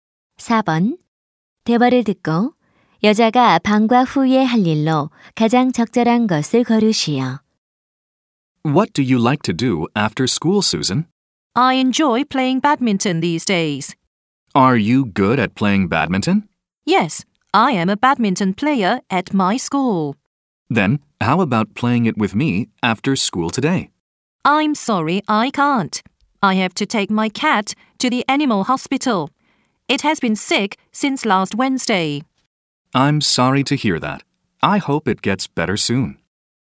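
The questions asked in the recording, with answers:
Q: 대화를 듣고 여자가 방과 후에 할 일로 가장 적절한 것을 고르시오.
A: 고양이를 동물병원에 데려가기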